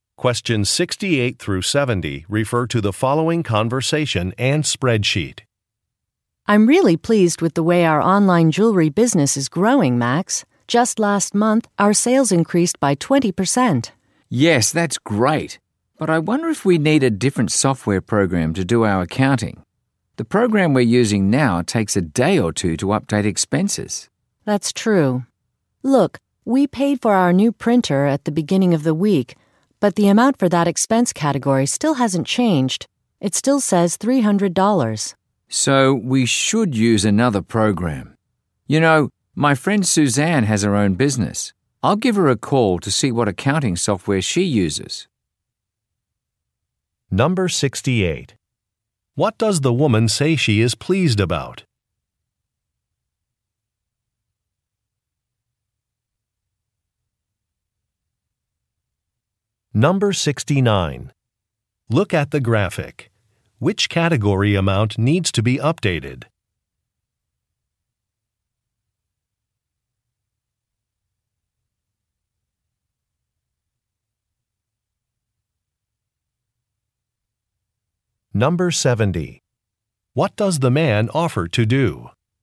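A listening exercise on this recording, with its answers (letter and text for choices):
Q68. What does the woman say she is pleased about?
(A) Employee performance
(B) Increased sales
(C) A positive review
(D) A store location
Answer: (B) Increased sales

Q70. What does the man offer to do?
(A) Correct an online catalog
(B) Adjust a budget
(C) Consult another business owner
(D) Postpone a business trip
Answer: (C) Consult another business owner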